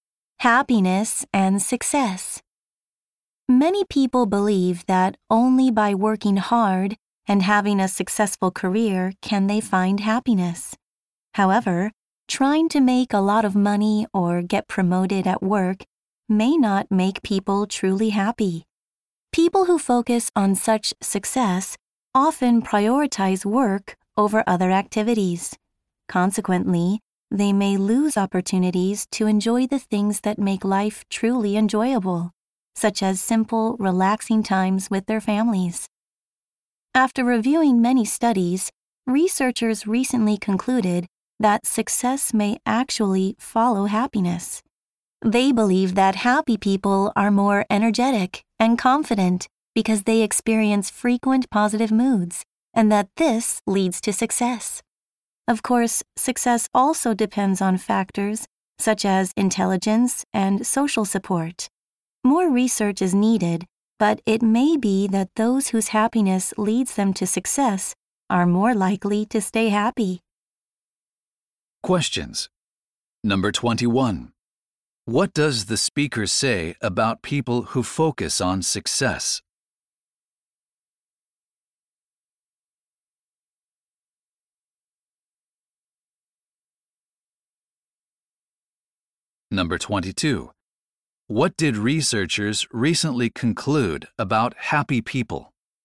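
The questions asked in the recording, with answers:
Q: What does the speaker say about people who focus on success?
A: They may miss out on enjoyable things like relaxing time with family.

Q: What did researchers recently conclude about happy people?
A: Their frequent positive moods make them energetic and confident, which leads to success.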